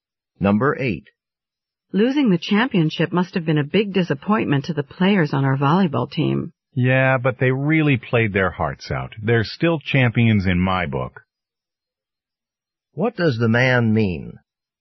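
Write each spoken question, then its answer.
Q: What does the man mean?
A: The team played very well, so he still thinks of them as champions.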